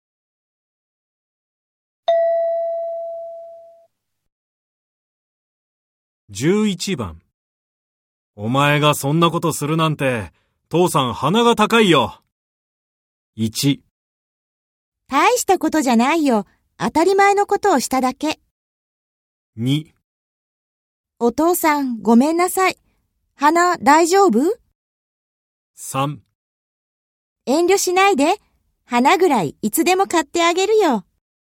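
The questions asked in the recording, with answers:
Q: お前がそんなことするなんて、父さん鼻が高いよ。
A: 1: 大したことじゃないよ。当たり前のことをしただけ。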